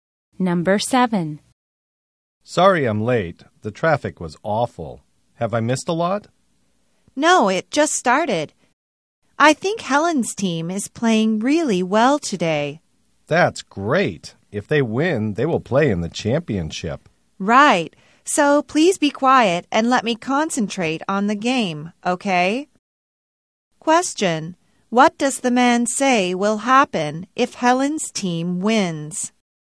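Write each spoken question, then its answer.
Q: What does the man say will happen if Helen's team wins?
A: They will play in the championship.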